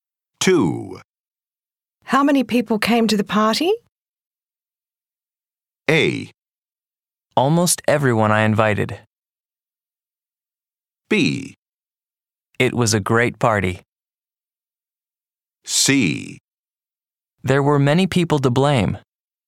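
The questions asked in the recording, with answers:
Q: How many people came to the party?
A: A: Almost everyone I invited.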